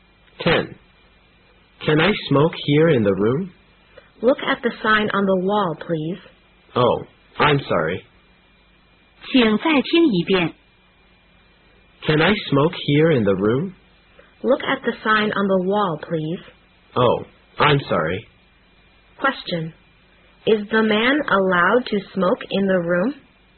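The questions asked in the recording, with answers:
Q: Is the man allowed to smoke in the room?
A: No, he isn't.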